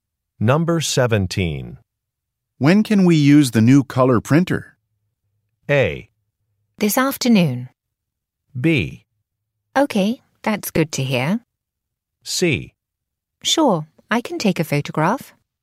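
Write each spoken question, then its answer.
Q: When can we use the new color printer?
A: A: This afternoon.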